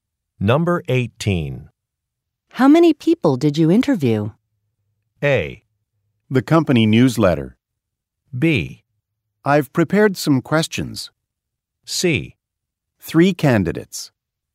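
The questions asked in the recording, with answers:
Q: How many people did you interview?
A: C: 3 candidates.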